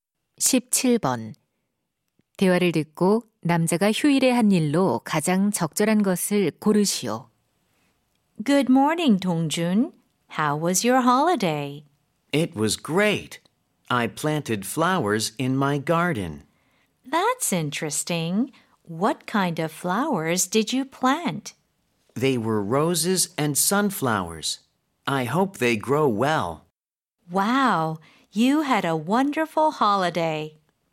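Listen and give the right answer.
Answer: 정원에 꽃 심기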